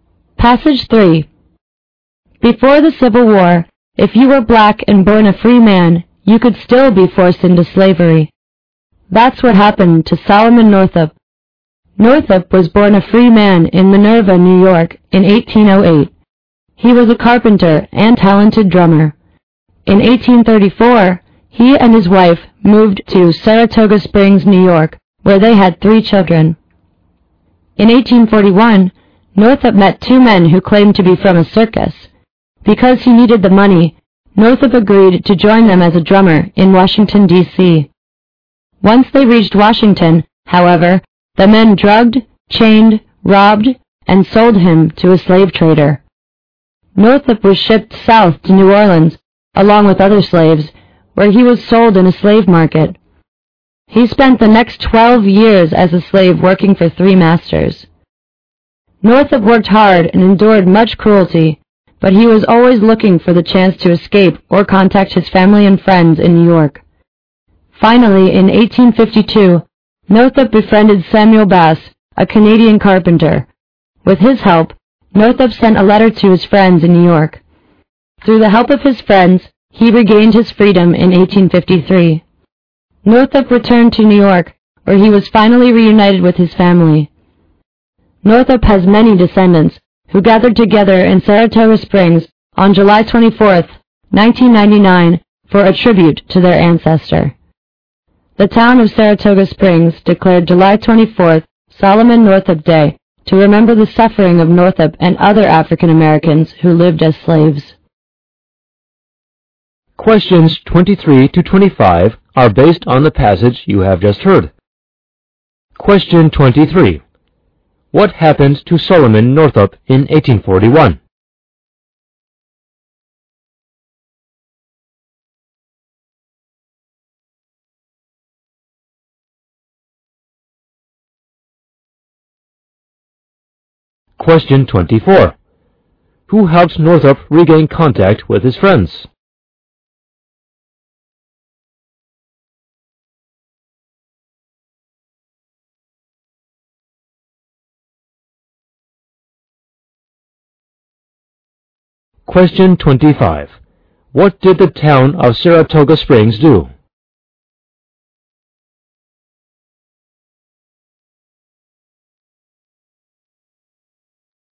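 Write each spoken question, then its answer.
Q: What happened to Solomon Northup in 1841?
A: He was drugged, robbed and sold into slavery

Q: Who helped Northup regain contact with his friends?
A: Samuel Bass, a Canadian carpenter

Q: What did the town of Saratoga Springs do?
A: It declared July 24th Solomon Northup Day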